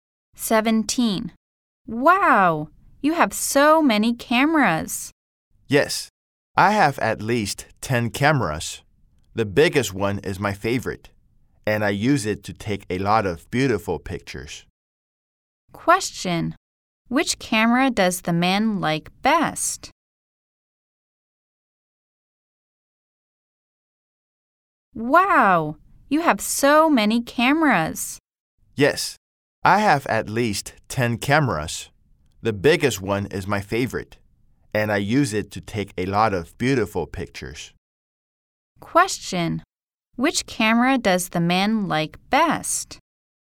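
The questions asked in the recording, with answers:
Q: Question: Which camera does the man like best?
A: The biggest one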